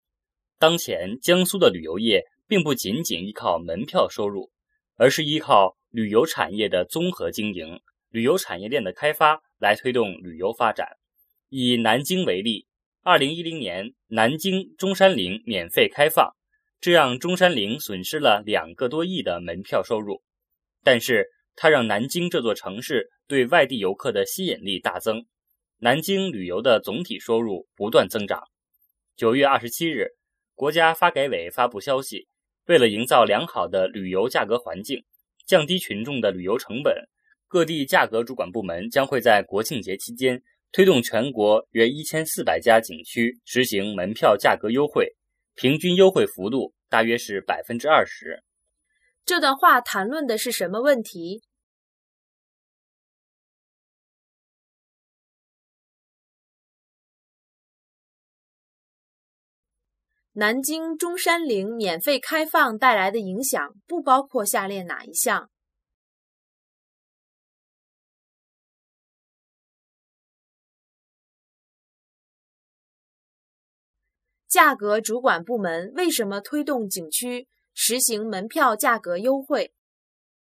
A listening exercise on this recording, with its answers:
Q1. 这段话谈论的是什么问题?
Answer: 旅游

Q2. 南京中山陵免费开放带来的影响不包括下列哪一项?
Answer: 中山陵被损坏了

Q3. 价格主管部门为什么推动景区实行门票价格优惠?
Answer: 降低旅游成本

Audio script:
当前江苏的旅游业并不仅仅依靠门票收入,而是依靠旅游产业的综合经营、旅游产业链的开发来推动旅游发展。以南京为例,2010年南京中山陵免费开放,这让中山陵损失了两个多亿的门票收入,但是它让南京这座城市对外地游客的吸引力大增,南京旅游的总体收入不断增长。9月27日,国家发改委发布消息,为了营造良好的旅游价格环境,降低群众的旅游成本,各地价格主管部门将会在国庆节期间推动全国约1400家景区实行门票价格优惠,平均优惠幅度大约是20%。

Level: 汉语水平考试(HSK)五级